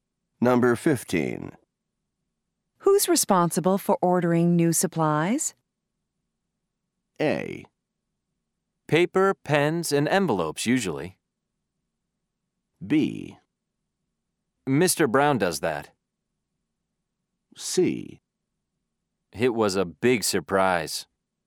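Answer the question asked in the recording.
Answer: B: Mr. Brown does that.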